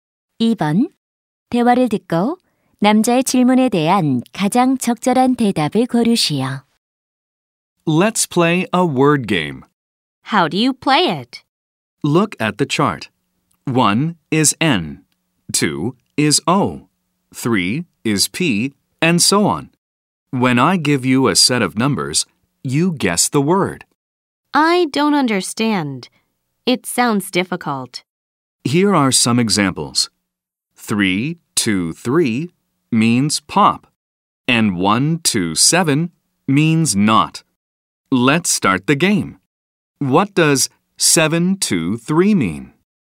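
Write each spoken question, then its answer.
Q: 대화를 듣고 남자의 질문에 대한 가장 적절한 대답을 고르시오.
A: top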